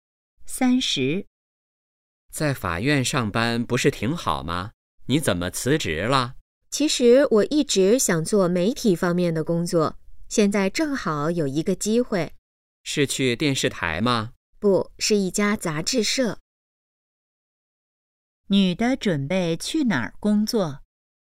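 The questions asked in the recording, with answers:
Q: 女的准备去哪儿工作?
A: 一家杂志社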